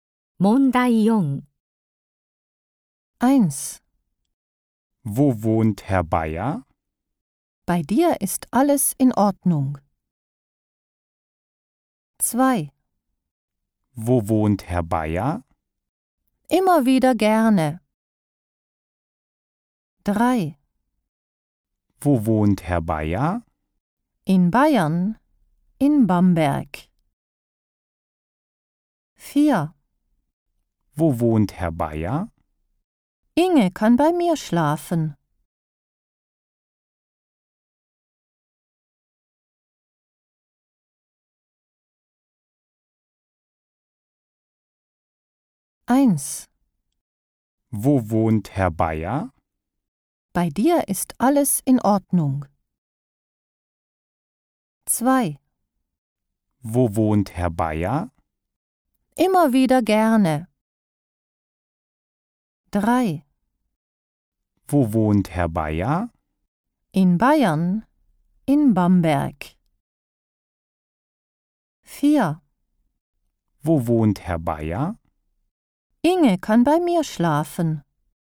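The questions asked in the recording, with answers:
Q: Wo wohnt Herr Bayer?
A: 3: In Bayern, in Bamberg.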